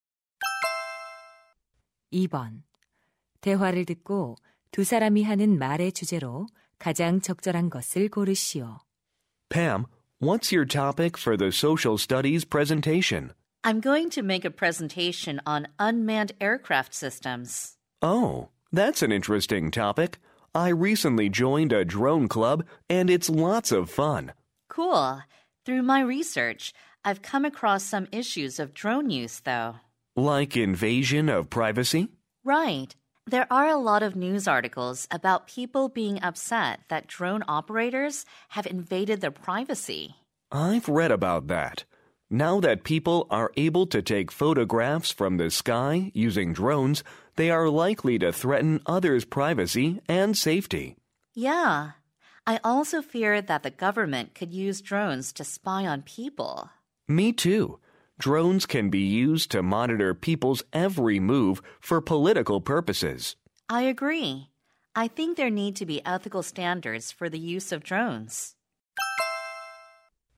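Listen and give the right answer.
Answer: 드론 사용으로 인한 문제점(사생활 침해 등)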